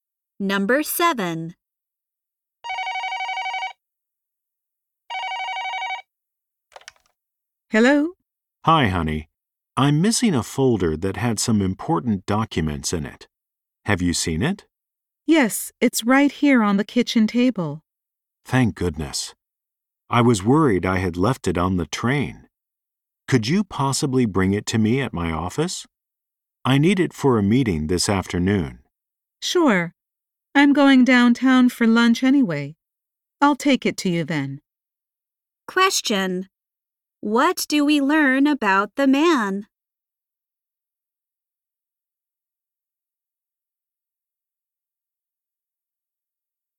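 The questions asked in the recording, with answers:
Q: What do we learn about the man?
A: He left a folder of important documents at home.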